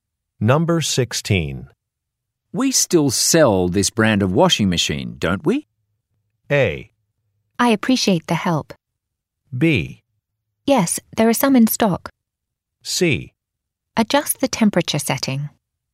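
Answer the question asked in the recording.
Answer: B: Yes, there are some in stock.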